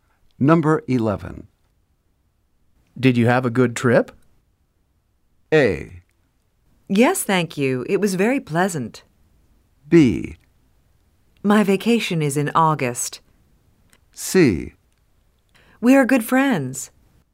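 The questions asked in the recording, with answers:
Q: Did you have a good trip?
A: A: Yes, thank you. It was very pleasant.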